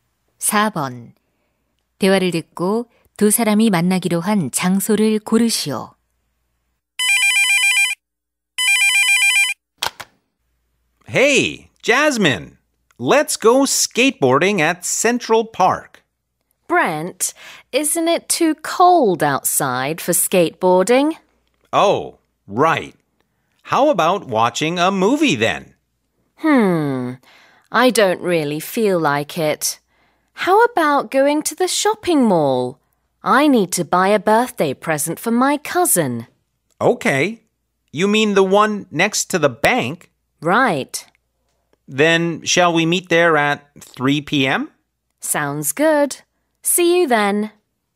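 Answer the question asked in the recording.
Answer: 은행 옆 쇼핑몰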